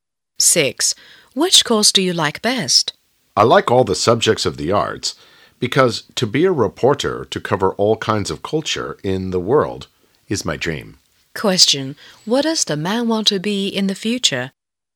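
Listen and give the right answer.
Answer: A reporter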